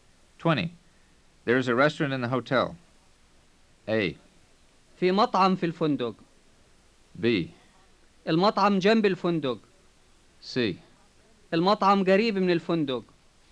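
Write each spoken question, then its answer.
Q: There is a restaurant in the hotel.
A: A: في مطعم في الفندق.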